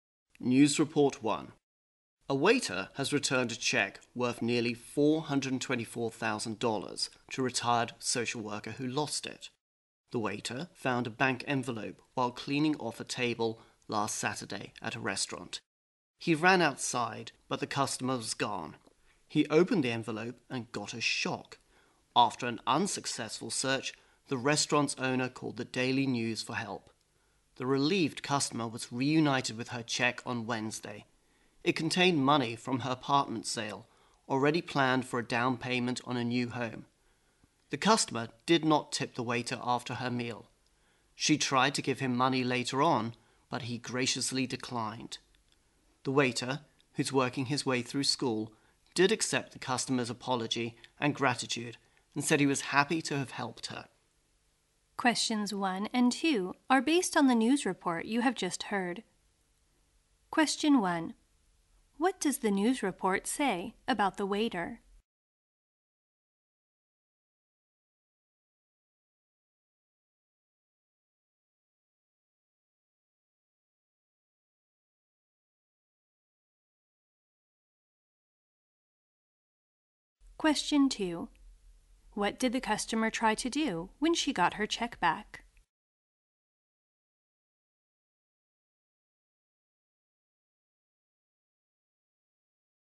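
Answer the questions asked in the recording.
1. He returned a lost check worth nearly $424,000 to its owner
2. Give the waiter some money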